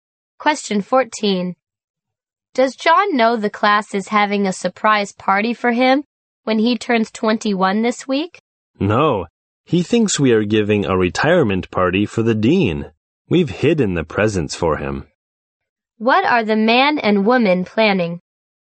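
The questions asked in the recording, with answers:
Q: What are the man and woman planning?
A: A surprise birthday party for John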